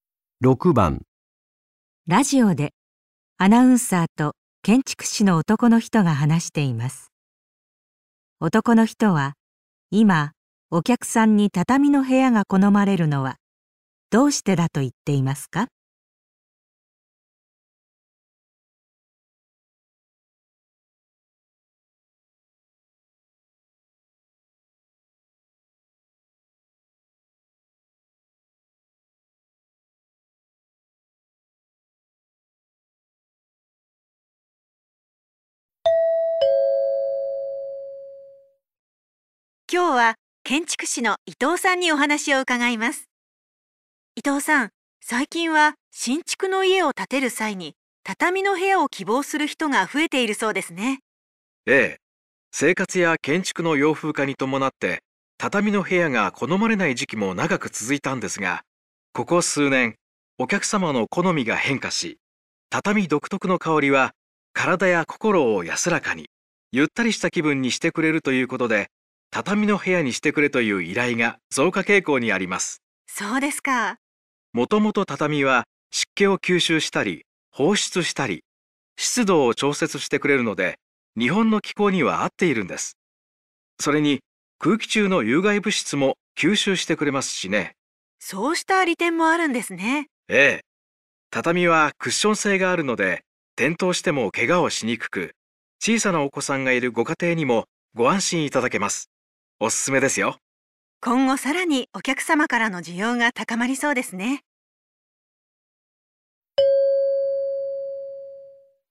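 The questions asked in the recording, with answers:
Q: 男の人は、今お客さんに畳の部屋が好まれるのはどうしてだと言っていますか?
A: 畳独特の香りが心身を安らかにしてくれるから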